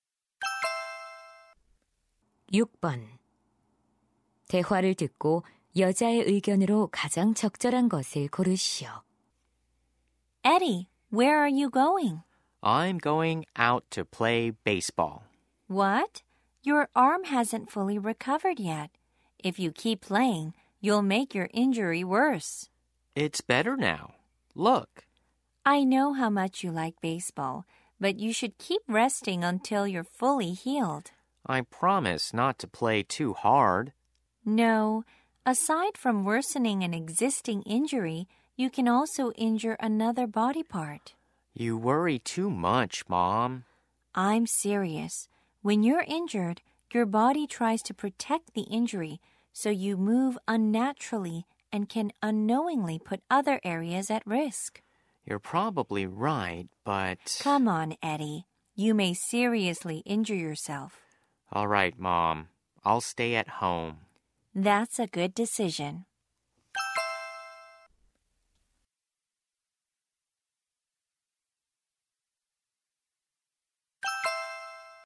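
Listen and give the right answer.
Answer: 부상이 완전히 나을 때까지 운동을 쉬어야 한다. 그렇지 않으면 다른 부위도 다칠 수 있다.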